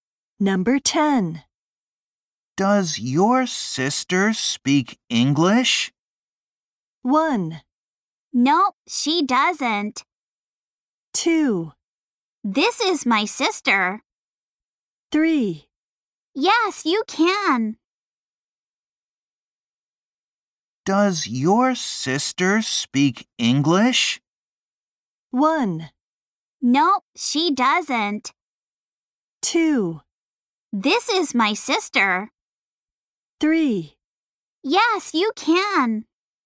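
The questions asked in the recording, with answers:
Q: Does your sister speak English?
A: 1: Nope, she doesn't.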